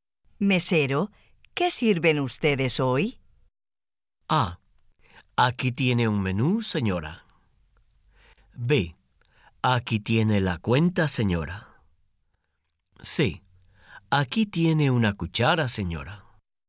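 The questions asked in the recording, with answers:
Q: Mesero, ¿qué sirven ustedes hoy?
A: A: Aquí tiene un menú, señora.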